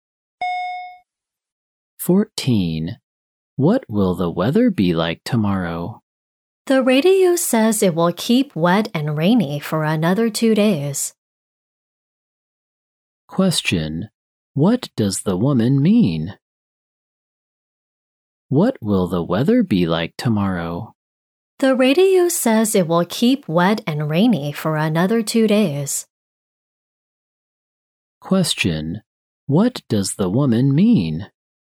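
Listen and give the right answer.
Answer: It will be wet and rainy tomorrow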